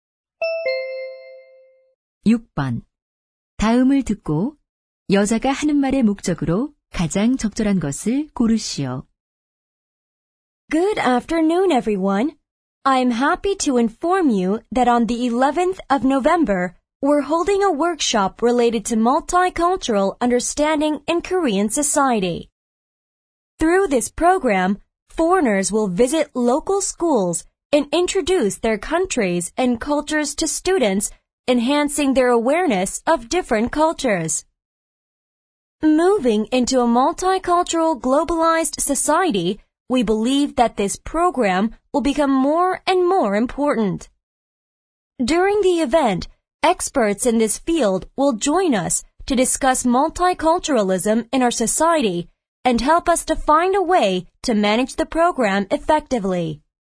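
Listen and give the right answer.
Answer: 다문화 이해 워크숍 개최를 알리려고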